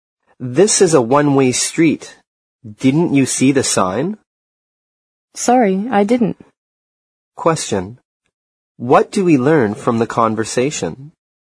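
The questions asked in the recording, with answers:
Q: What do we learn from the conversation?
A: The driver went the wrong way down a one-way street because they didn't see the sign.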